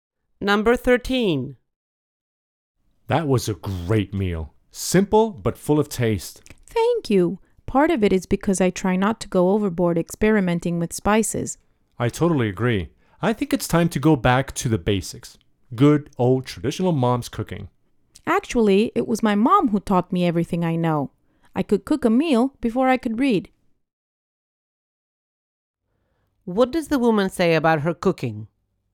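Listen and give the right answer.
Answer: Her mom taught her, and she has cooked since she was very young.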